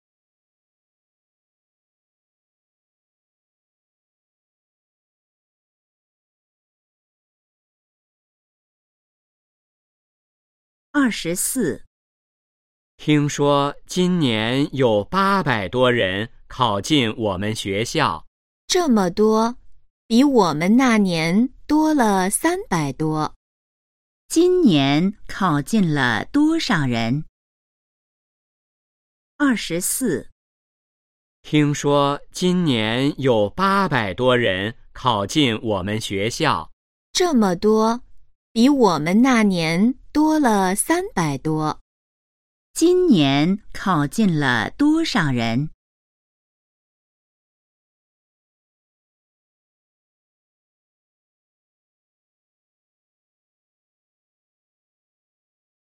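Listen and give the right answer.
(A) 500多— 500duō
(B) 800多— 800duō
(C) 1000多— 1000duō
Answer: (B) 800多— 800duō

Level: HSK2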